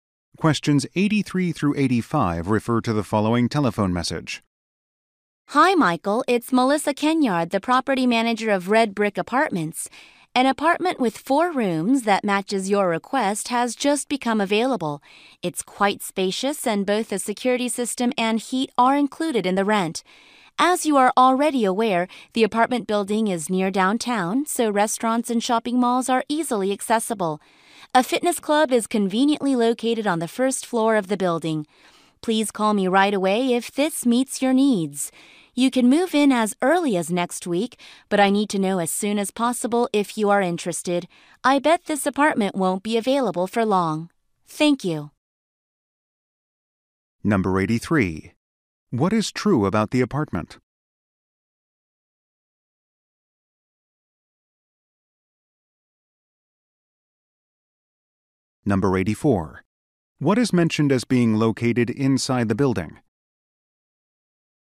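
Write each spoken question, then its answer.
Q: What is true about the apartment?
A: It has four rooms and includes security and heat in the rent

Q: What is mentioned as being located inside the building?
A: A fitness club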